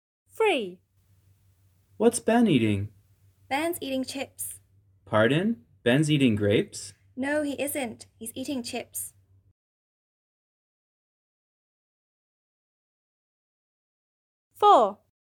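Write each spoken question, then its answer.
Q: What's Ben eating?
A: chips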